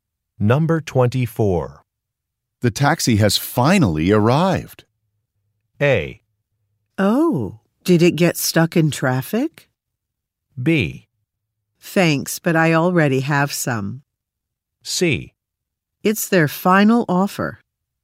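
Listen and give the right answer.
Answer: A: Oh, did it get stuck in traffic?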